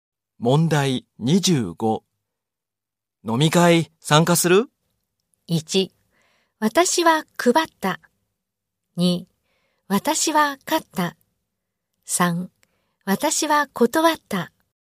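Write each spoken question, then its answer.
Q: 飲み会参加する?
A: 3: 私は断った。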